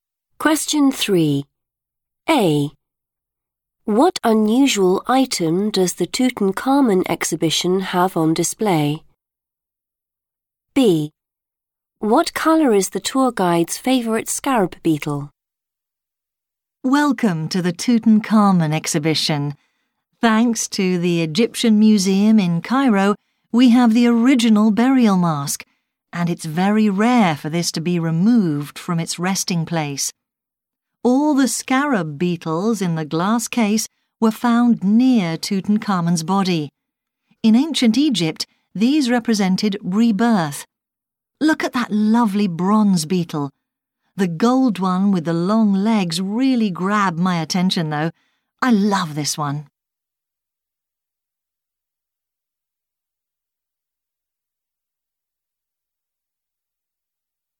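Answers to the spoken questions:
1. the original burial mask
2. gold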